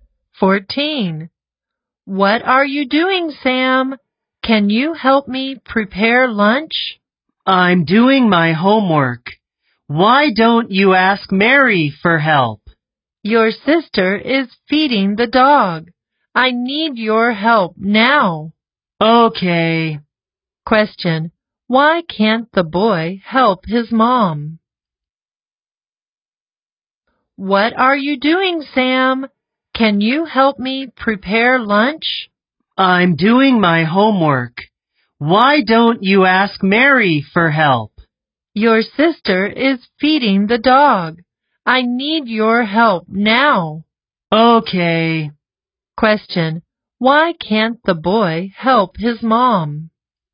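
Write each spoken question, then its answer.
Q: Question. Why can't the boy help his mom?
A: He is doing his homework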